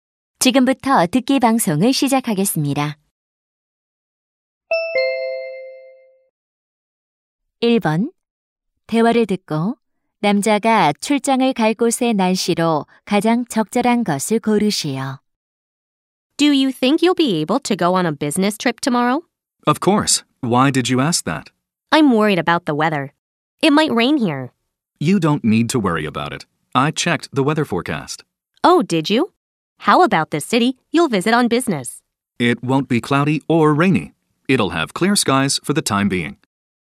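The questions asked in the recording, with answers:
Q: 대화를 듣고 남자가 출장을 갈 곳의 날씨로 가장 적절한 것을 고르시오.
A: 맑음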